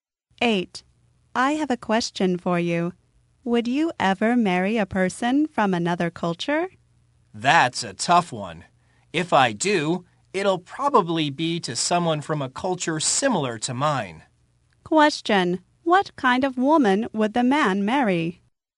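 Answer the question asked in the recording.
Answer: Someone from a culture similar to his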